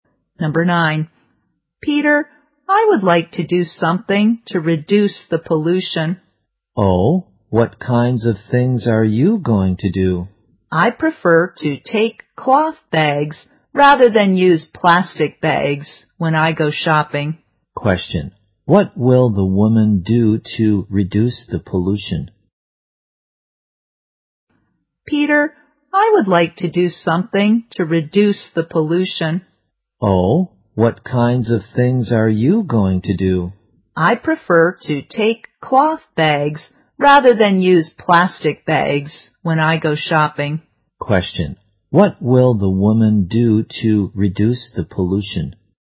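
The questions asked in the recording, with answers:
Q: Question. What will the woman do to reduce the pollution?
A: Take cloth bags instead of plastic bags when shopping.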